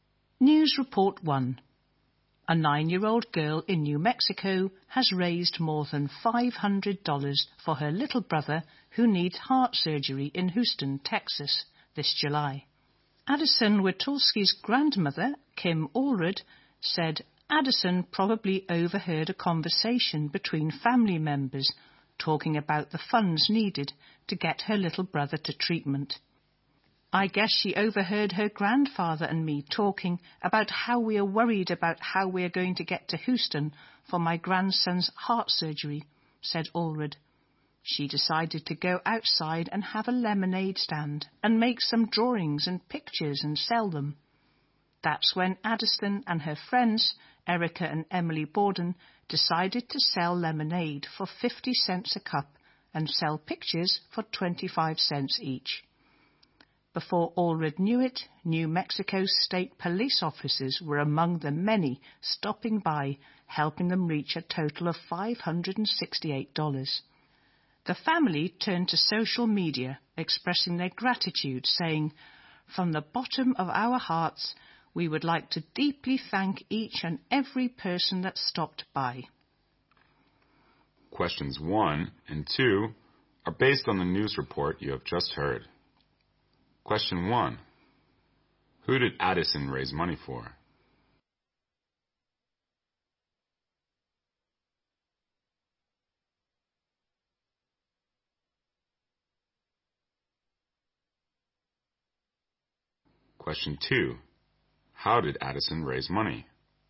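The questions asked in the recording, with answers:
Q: Who did Addison raise money for?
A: Her little brother, who needs heart surgery

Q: How did Addison raise money?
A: By selling lemonade and pictures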